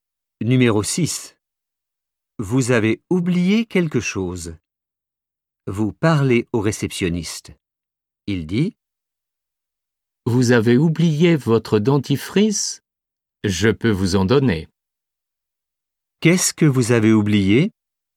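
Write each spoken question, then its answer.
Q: Qu'est-ce que vous avez oublié ?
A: votre dentifrice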